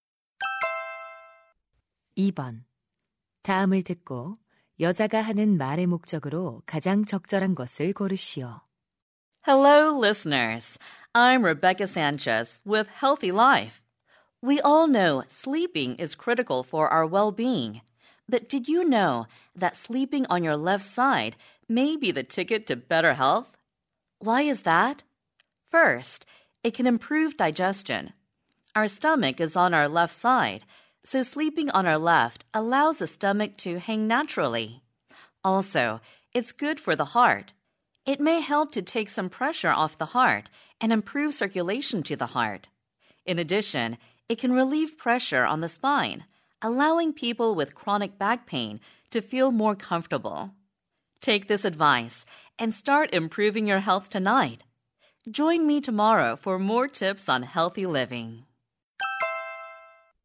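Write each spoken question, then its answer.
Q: 다음을 듣고 여자가 하는 말의 목적으로 가장 적절한 것을 고르시오.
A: 왼쪽으로 누워 자는 것의 건강상 이점을 알려 주려고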